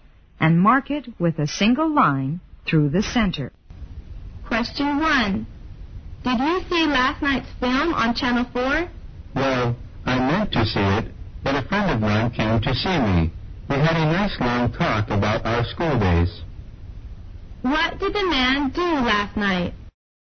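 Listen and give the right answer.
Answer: He talked with a friend about their school days instead of watching the film.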